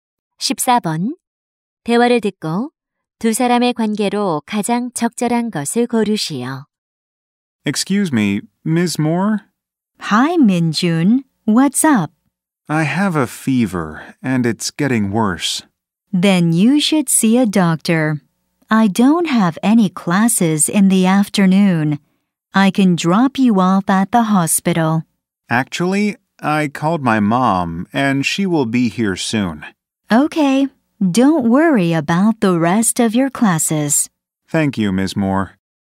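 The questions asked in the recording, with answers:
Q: 대화를 듣고 두 사람의 관계로 가장 적절한 것을 고르시오.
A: 교사와 학생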